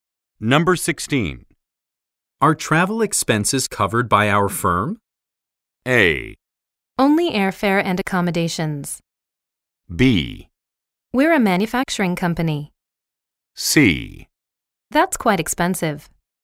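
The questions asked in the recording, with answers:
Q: Are travel expenses covered by our firm?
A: A: Only airfare and accommodations.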